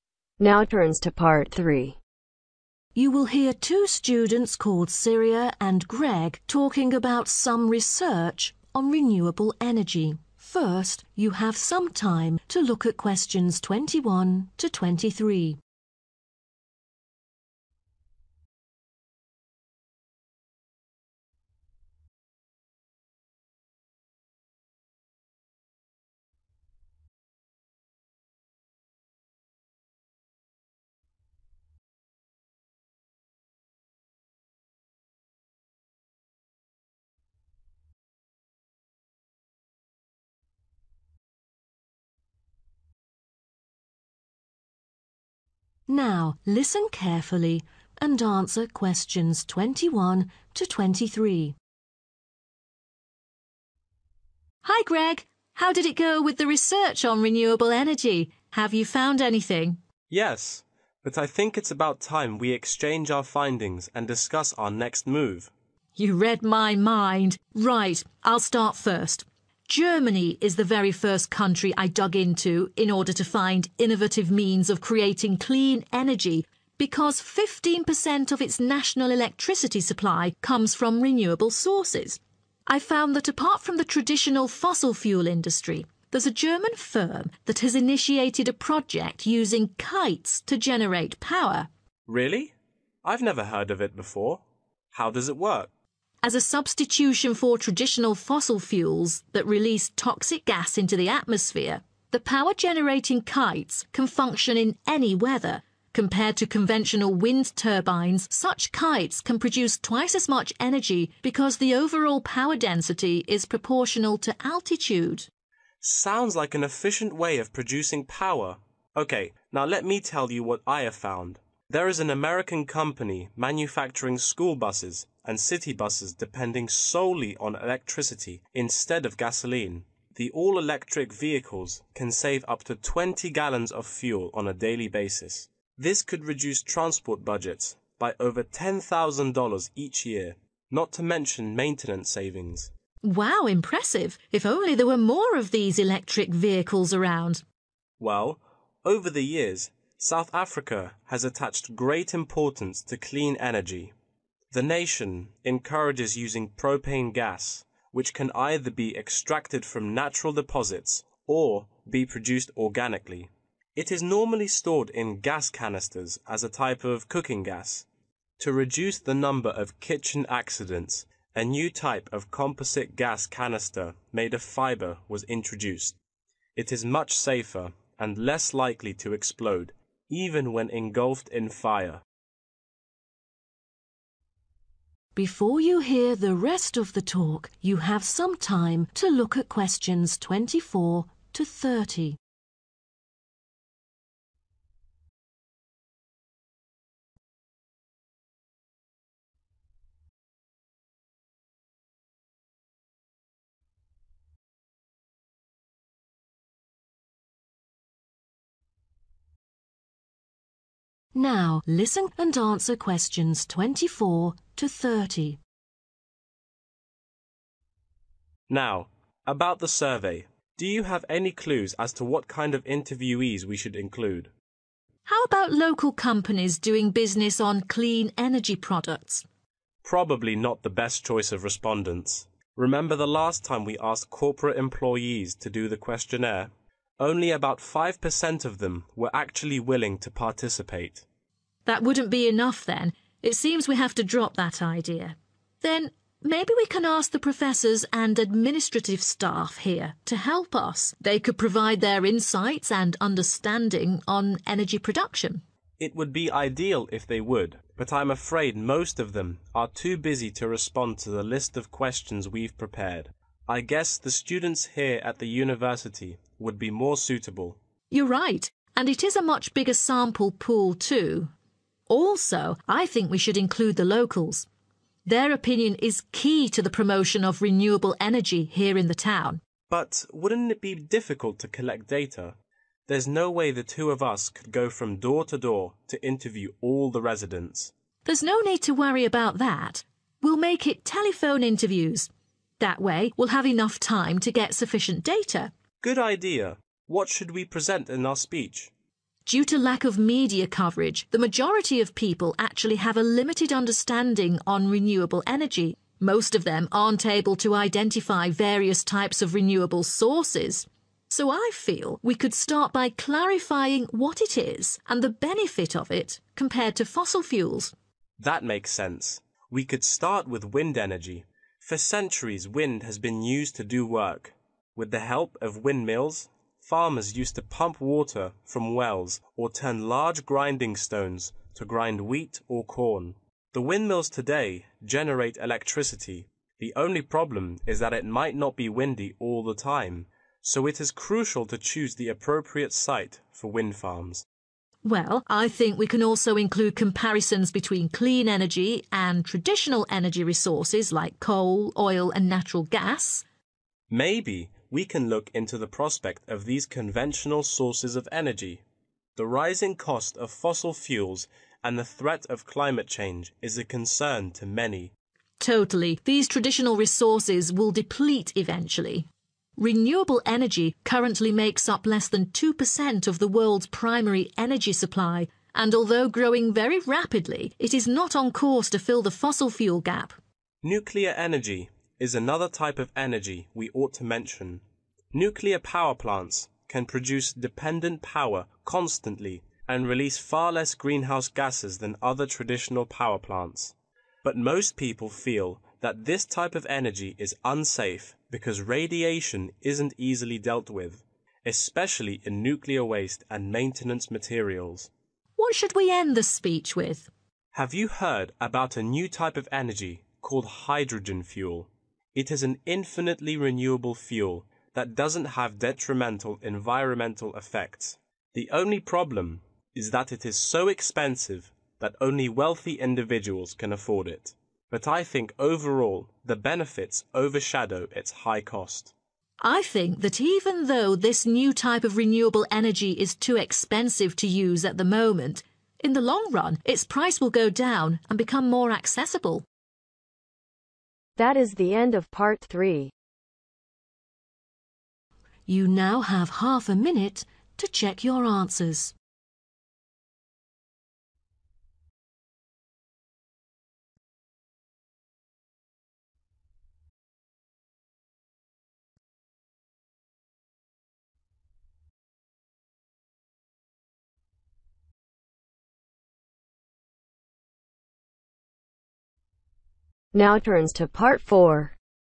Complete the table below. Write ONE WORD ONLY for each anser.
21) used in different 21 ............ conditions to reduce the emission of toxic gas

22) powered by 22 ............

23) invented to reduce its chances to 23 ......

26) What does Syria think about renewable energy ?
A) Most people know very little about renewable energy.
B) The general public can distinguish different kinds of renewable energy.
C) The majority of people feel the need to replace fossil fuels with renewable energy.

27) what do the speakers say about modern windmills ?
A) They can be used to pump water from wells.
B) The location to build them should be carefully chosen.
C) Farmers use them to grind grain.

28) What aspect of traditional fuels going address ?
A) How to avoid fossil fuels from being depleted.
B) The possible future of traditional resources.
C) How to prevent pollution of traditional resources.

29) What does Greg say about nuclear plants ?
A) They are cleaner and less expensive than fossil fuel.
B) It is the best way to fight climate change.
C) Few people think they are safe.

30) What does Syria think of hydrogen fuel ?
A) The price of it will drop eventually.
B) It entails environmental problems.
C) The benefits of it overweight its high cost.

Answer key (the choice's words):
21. weather
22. electricity
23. explode
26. Most people know very little about renewable energy.
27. The location to build them should be carefully chosen.
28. The possible future of traditional resources.
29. Few people think they are safe.
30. The price of it will drop eventually.